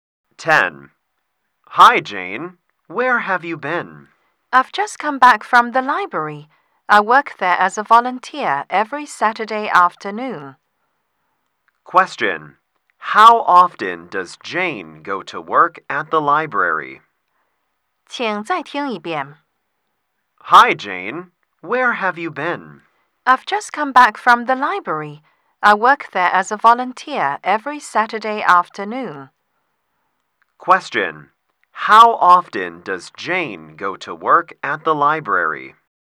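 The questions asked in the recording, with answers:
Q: How often does Jane go to work at the library?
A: Once a week (every Saturday afternoon).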